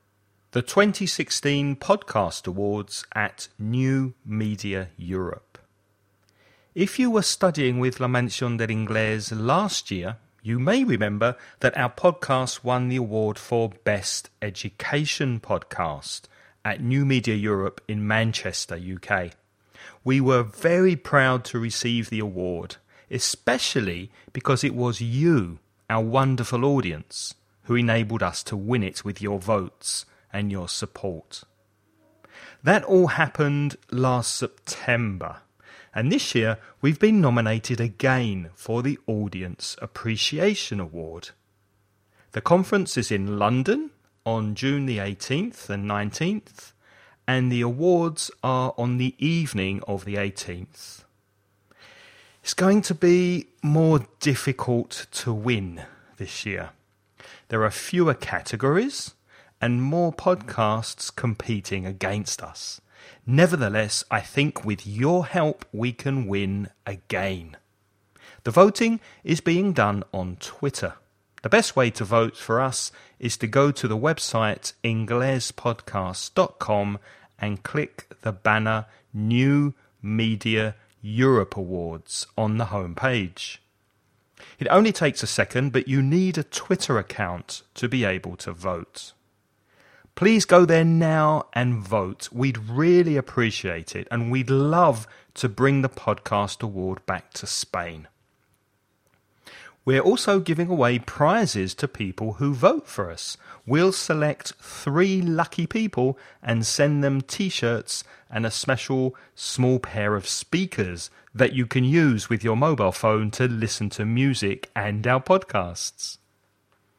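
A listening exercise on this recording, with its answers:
Listen and write the questions you hear.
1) In which city was New Media Europe held in 2015?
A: Manchester

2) When is the award ceremony this year?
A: On the evening of June 18th

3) What 2 reasons are given for the awards being harder this year than last year?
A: There are fewer categories and more podcasts competing

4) On which social media platform can you vote?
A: Twitter

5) What's the name of the website where you can go to vote for the podcast?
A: inglespodcast.com

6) What prizes are being offered for people who vote?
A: T-shirts and a small pair of speakers for mobile phones

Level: nivel avanzado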